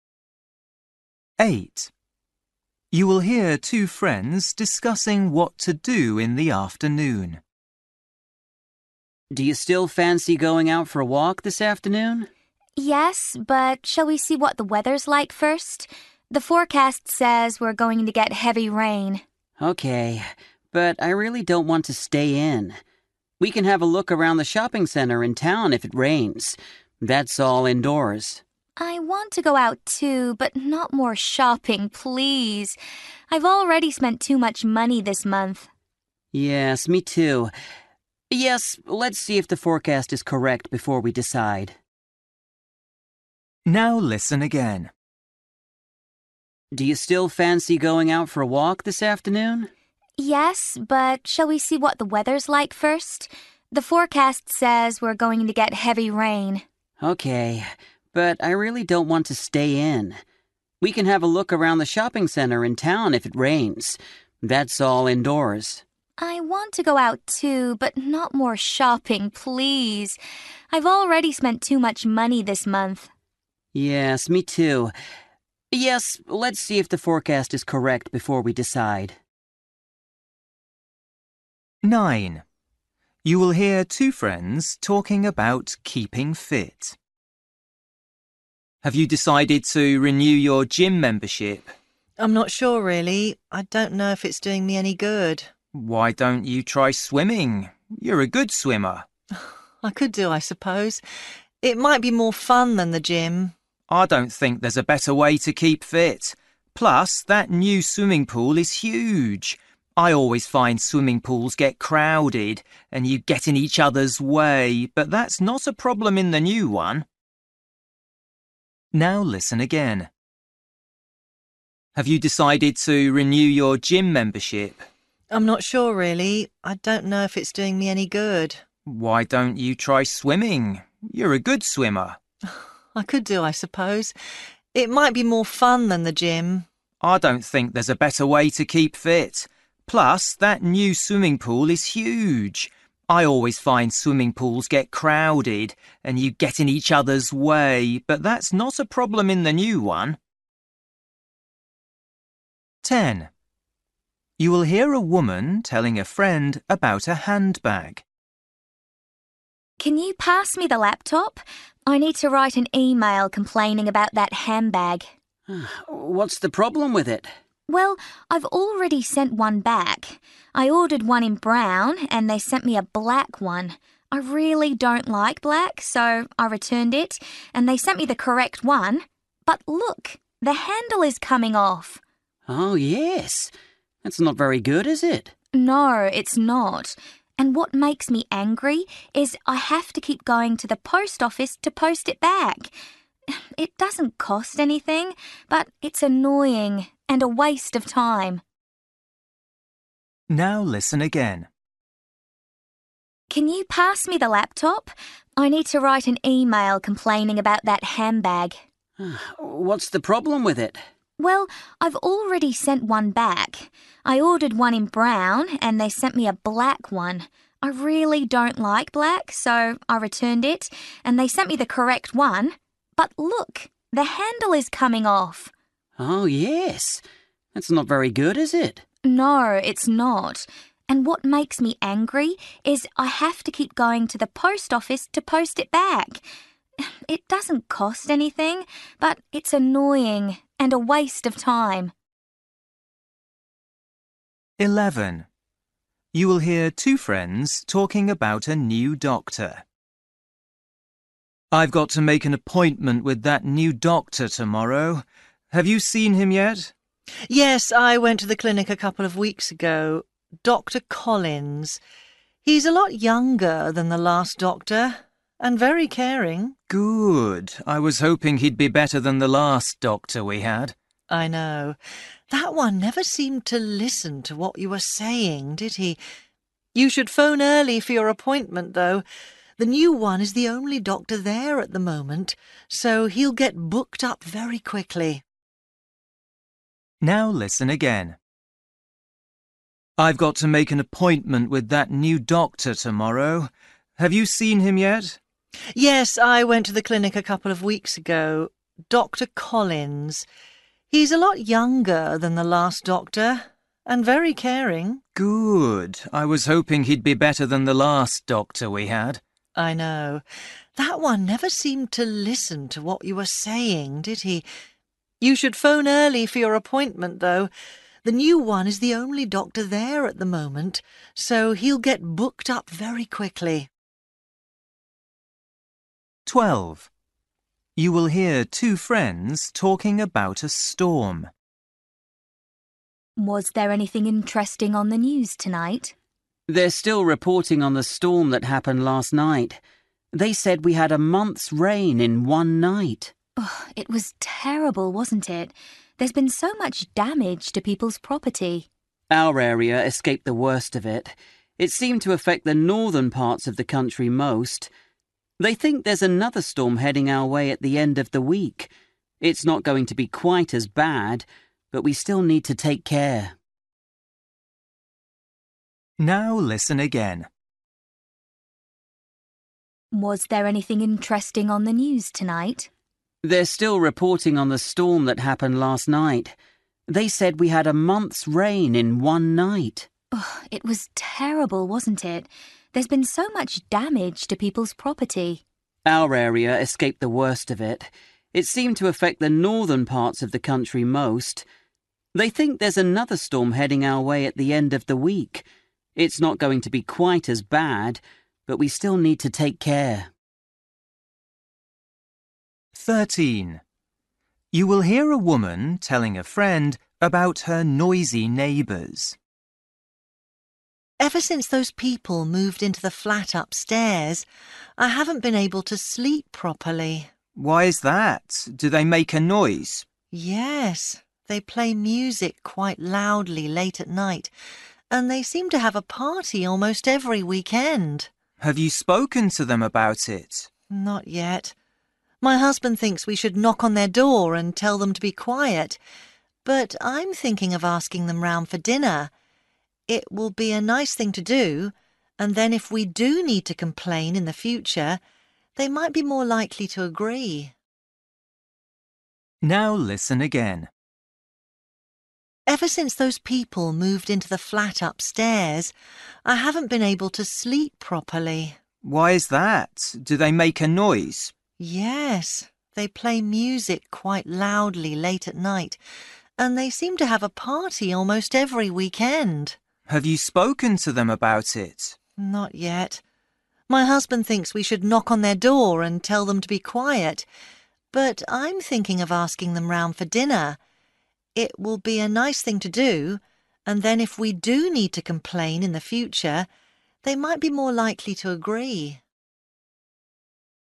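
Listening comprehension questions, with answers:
For each question, choose the correct answer.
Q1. You will hear two friends discussing what to do in the afternoon. What do they agree to do?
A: Wait to see if the weather forecast is correct before deciding.

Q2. You will hear two friends talking about keeping fit. What does the man say about swimming?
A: The new swimming pool is huge, so it doesn't get crowded.

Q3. You will hear a woman telling a friend about a handbag. What does she say?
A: The handle is coming off, and she is annoyed at having to keep posting it back.

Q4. You will hear two friends talking about a new doctor. The woman thinks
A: the new doctor is caring and better than the last one.

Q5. You will hear two friends talking about a storm. The man says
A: another, less severe storm is expected at the end of the week.

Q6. You will hear a woman telling a friend about her noisy neighbours. 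What is the woman planning to do?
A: Invite the neighbours round for dinner.

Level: Luyện nghe trình độ B1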